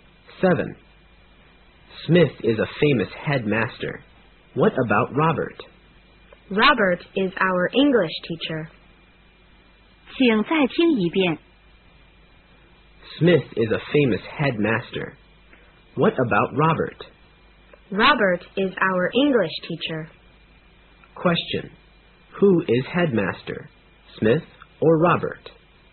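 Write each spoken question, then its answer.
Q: Who is headmaster?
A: Smith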